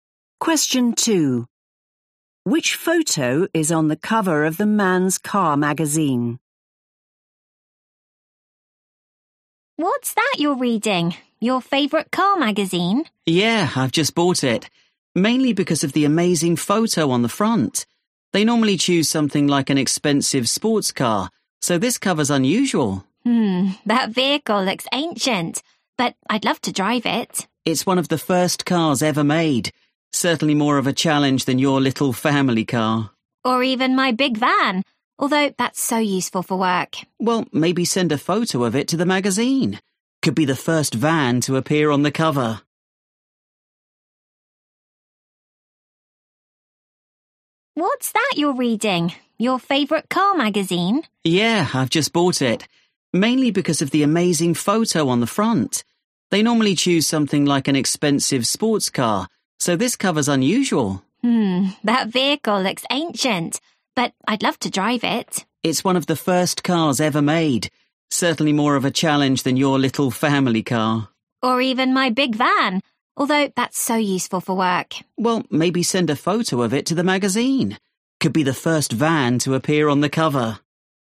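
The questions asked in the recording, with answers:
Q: Which photo is on the cover of the Man's Car magazine?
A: a very old car, one of the first cars ever made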